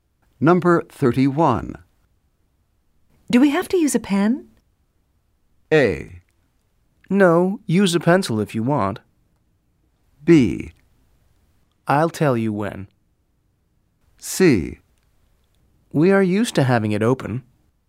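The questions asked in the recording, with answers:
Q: Do we have to use a pen?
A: A: No, use a pencil if you want.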